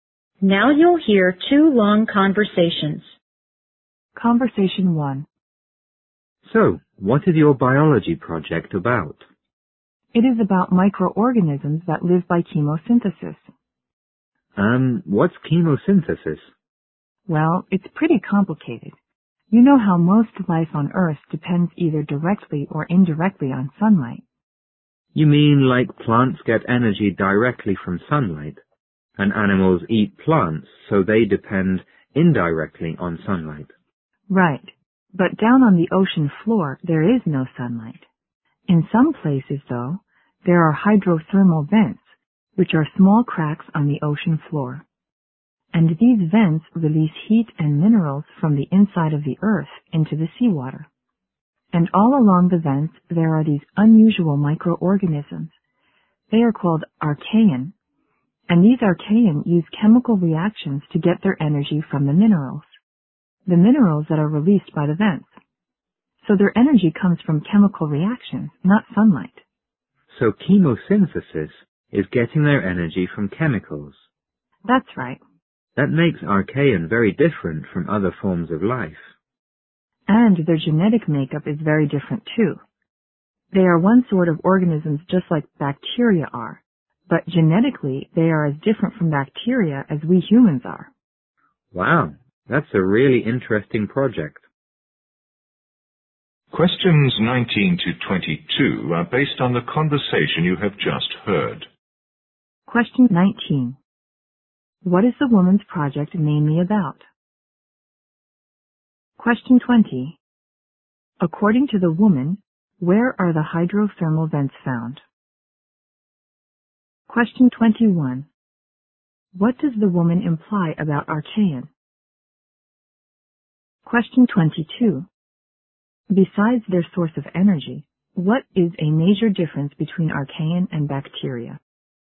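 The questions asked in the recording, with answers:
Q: What is the woman's project mainly about?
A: Microorganisms that live by chemosynthesis

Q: According to the woman, where are the hydrothermal vents found?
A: On the ocean floor

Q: Besides their source of energy, what is a major difference between archaean and bacteria?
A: Their genetic makeup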